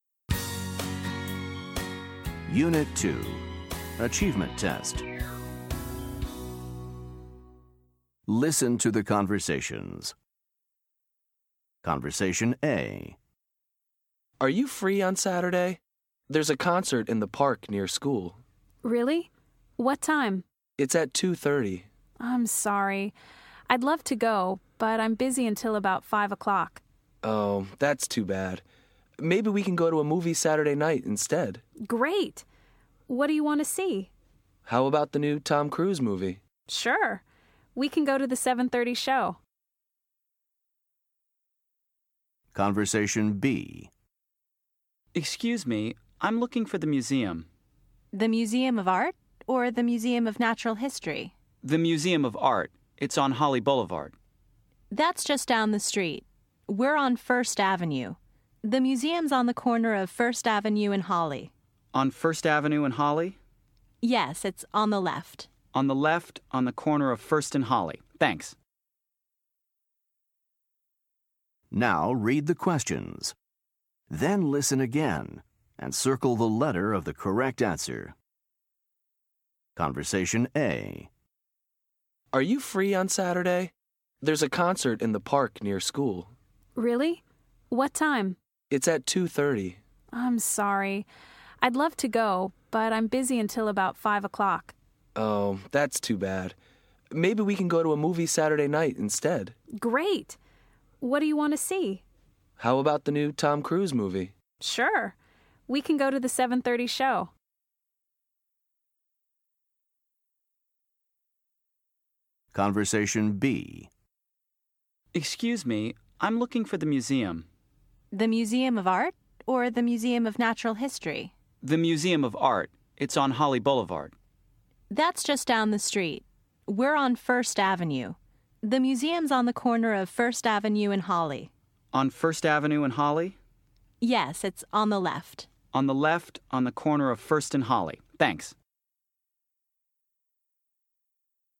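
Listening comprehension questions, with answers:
Listen to the conversations. Choose the correct answer for each question.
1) What time is the concert?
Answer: At 2:30

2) Why doesn't the woman want to go to the concert?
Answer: She's busy until about 5 o'clock

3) When is the movie?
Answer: Saturday night at 7:30

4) What is the man looking for?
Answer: The Museum of Art

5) Where are the speakers?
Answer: On First Avenue

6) Where is the museum?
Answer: On the corner of First Avenue and Holly, on the left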